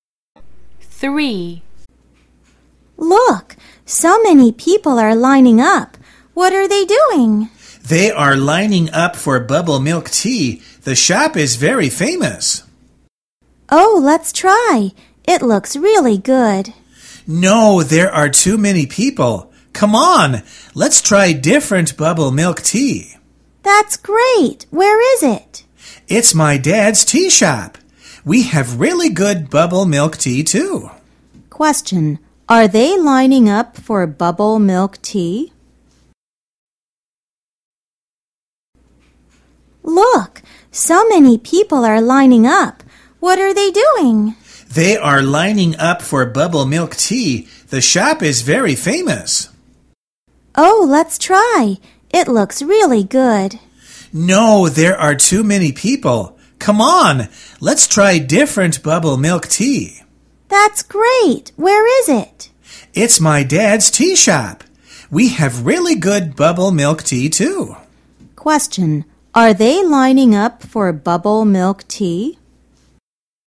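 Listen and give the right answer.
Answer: Yes, they are.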